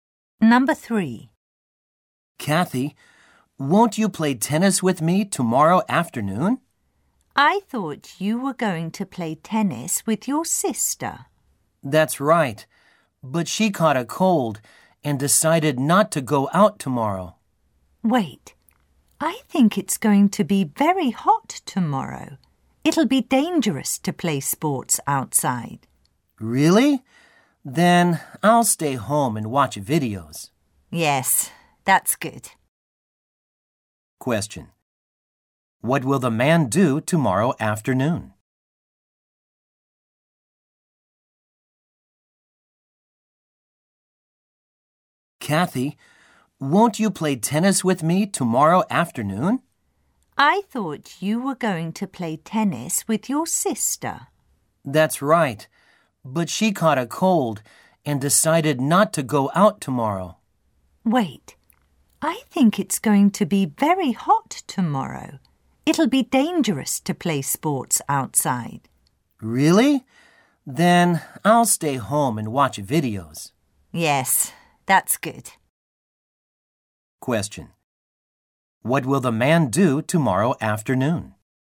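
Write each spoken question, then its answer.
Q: What will the man do tomorrow afternoon?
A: Stay home and watch videos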